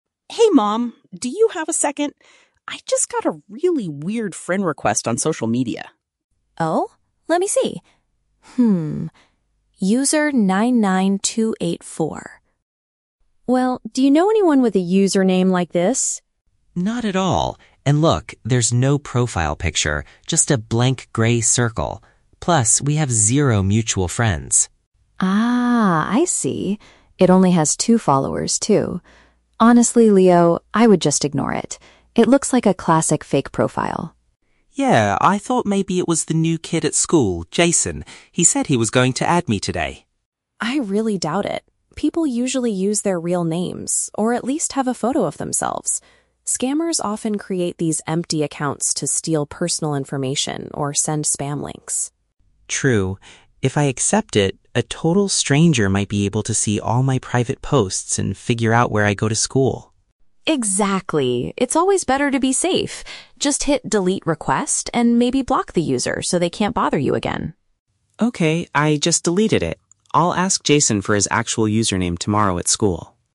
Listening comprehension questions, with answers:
Listen to the conversation between a mother and her teenage son, and choose the correct answer (A, B, or C) for each question.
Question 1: What makes Leo doubt the friend request initially?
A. He thinks it belongs to a new student from his class.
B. The profile lacks any shared contacts with him.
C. The account recently sent him a strange text message.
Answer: The profile lacks any shared contacts with him.

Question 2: What does the mother say is the danger of these types of profiles?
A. They are created to gather people's private data.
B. They belong to users with very few followers.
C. They might send computer viruses to the phone.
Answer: They are created to gather people's private data.

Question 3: How does Leo resolve the situation?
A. He rejects the invitation completely.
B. He sends a text message to his friend Jason to check.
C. He decides to block all future friend requests.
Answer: He rejects the invitation completely.

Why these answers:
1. Leo is suspicious because the account has "zero mutual friends." Option B uses the synonym "lacks any shared contacts" to express the same idea. Why the traps are wrong: Option A is a trap; he mentions Jason, but thinking it was Jason was a reason he might accept it, not the reason he doubted it. Option C is plausible, but the audio never mentions the account sending him a message.
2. The mother warns that scammers use these accounts to "steal personal information." Option A uses the synonym "gather people's private data." Why the traps are wrong: Option B is a trap because the mother does mention the account only has "two followers", but that is just an observation, not the actual danger. Option C is incorrect because she mentions "spam links," not viruses.
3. Leo follows his mother's advice and says, "I just deleted it." Option A paraphrases "deleted it" as "rejects the invitation." Why the traps are wrong: Option B is a trap because he mentions Jason, but he says he will ask him "tomorrow at school," not by sending a text message right now. Option C is incorrect because he only deletes/blocks this specific user, not all future requests.

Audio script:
Leo: Hey Mom, do you have a second? I just got a really weird friend request on social media.
Mom: Oh? Let me see. Hmm... Well, do you know anyone with a username like this?
Leo: Not at all. And look, there's no profile picture, just a blank gray circle. Plus, we have zero mutual friends.
Mom: Ah, I see. It only has two followers, too. Honestly, Leo, I would just ignore it. It looks like a classic fake profile.
Leo: Yeah, I thought maybe it was the new kid at school, Jason. He said he was going to add me today.
Mom: I really doubt it. People usually use their real names or at least have a photo of themselves. Scammers often create these empty accounts to steal personal information or send spam links.
Leo: True. If I accept it, a total stranger might be able to see all my private posts and figure out where I go to school.
Mom: Exactly. It's always better to be safe. Just hit "delete request" and maybe block the user so they can't bother you again.
Leo: Okay, I just deleted it. I'll ask Jason for his actual username tomorrow at school.

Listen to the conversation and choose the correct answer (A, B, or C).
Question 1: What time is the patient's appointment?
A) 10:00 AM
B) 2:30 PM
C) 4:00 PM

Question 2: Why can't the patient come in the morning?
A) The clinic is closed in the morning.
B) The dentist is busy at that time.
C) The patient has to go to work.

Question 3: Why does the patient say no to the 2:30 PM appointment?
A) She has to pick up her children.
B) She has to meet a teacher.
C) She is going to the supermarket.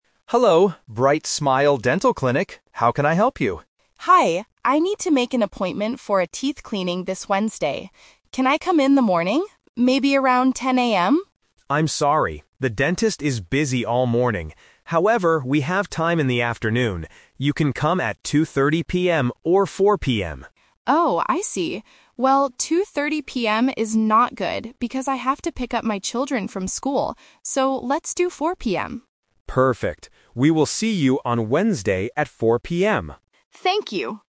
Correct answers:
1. 4:00 PM
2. The dentist is busy at that time.
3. She has to pick up her children.

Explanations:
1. They finally agree on 4:00 PM. Option (A) is a trap because 10:00 AM is the patient's first choice, but the clinic is full. Option (B) is a trap because 2:30 PM is offered by the receptionist, but the patient rejects it.
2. The receptionist says, "the dentist is busy all morning." Option (A) is a plausible reason for not getting an appointment, but it is not mentioned. Option (C) is a trap because work is not the reason; the problem is from the clinic's side.
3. The patient says, "2:30 PM is not good because I have to pick up my children from school." Option (B) is a trap because "school" is mentioned, but she is picking up her kids, not meeting a teacher. Option (C) is not mentioned in the audio.

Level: A2

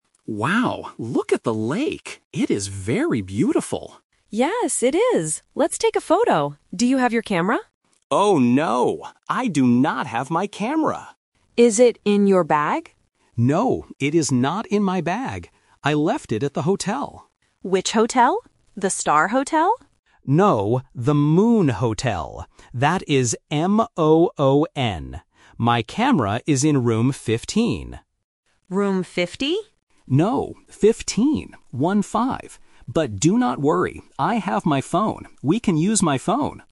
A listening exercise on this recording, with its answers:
Listen to the conversation and choose the correct answer (A, B, or C).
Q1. What did the man leave at the hotel?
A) His bag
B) His camera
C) His phone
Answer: His camera

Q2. How does the man spell the name of the hotel?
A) M-A-O-N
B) M-O-O-N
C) M-O-N-N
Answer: M-O-O-N

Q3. What is his room number?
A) Room 5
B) Room 15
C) Room 50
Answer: Room 15

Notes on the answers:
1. The man explicitly says, "I do not have my camera... I left it at the hotel." Option (A) is the trap because the woman asks if it is in his bag, but he says "No, it is not in my bag." Option (C) is also a trap because he actually has his phone with him ("I have my phone").
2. The man spells the hotel's name clearly: M-O-O-N. Option (A) uses the wrong vowel "A", and Option (C) uses a double "N" instead of a double "O", testing the student's ability to hear double letters accurately.
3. The man says his camera is in room 15. The woman mishears and asks "Room 50?" (The Trap), but the man corrects her: "No, 15. One-five." This is the classic pronunciation trap for "-teen" vs "-ty".

